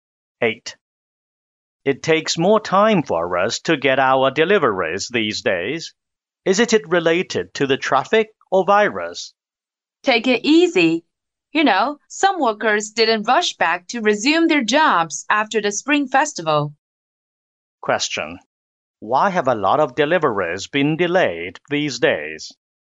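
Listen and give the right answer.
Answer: Some workers didn't return to work after the Spring Festival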